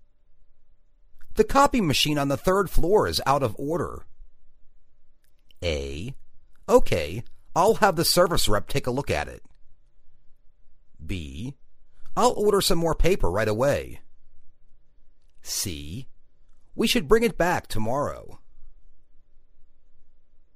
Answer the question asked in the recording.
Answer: OK, I'll have the service rep look at it.